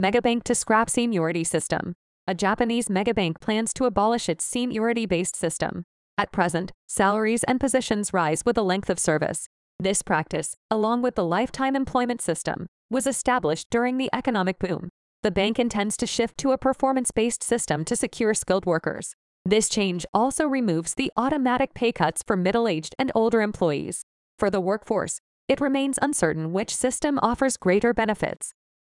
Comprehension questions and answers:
英語ニュースの音声を聞き、各空欄に入る英文を正確に書き取ってください。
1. A Japanese mega-bank plans to ( ).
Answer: abolish its seniority-based system

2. At present, ( ).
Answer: salaries and positions rise with the length of service

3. This practice, ( ), was established during the economic boom.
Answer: along with the lifetime employment system

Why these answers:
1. ▶「seniority(年功序列)」という単語に馴染みがなく、「yearly」と聞き間違えた。 ⇒ 今回の課題Topicのキーワードなので、これを間違えるのはイタイです。「seniority-based system(年功序列制)」の形で覚えておきましょう。
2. ▶「length」を「rank」と聞き間違えた。 ⇒ LとRの聞き分けは日本人には難しいですが、ここでは「length of service(勤務の長さ)」という意味なので、文脈を読み取る読解力があれば聞き取れます。 ▶「with」を「for」と聞き間違えた。 ⇒ この機能語を音だけで聞き分けるのは困難です。「勤務年数と共に上がる」という意味から理解するのが確実です。
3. ▶「the lifetime employment system」の定冠詞「the」を飛ばしてしまった。 ⇒「system」が可算名詞であり、決まった制度なので定冠詞が必要です。

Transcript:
Mega Bank to Scrap Seniority System
A Japanese mega-bank plans to abolish its seniority-based system.
At present, salaries and positions rise with the length of service.
This practice, along with the lifetime employment system, was established during the economic boom.
The bank intends to shift to a performance-based system to secure skilled workers.
This change also removes the automatic pay cuts for middle-aged and older employees.
For the workforce, it remains uncertain which system offers greater benefits.